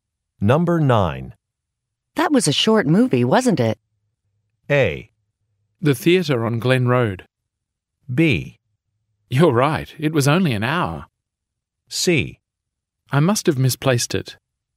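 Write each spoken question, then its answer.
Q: That was a short movie, wasn't it?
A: B: You're right. It was only an hour.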